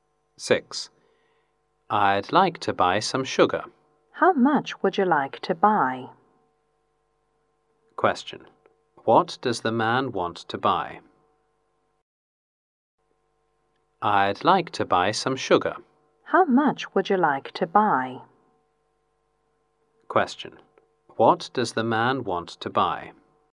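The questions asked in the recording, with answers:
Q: What does the man want to buy?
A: Some sugar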